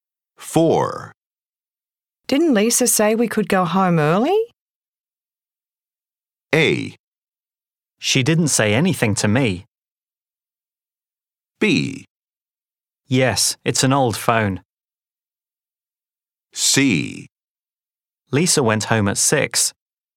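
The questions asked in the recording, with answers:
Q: Didn't Lisa say we could go home early?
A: A: She didn't say anything to me.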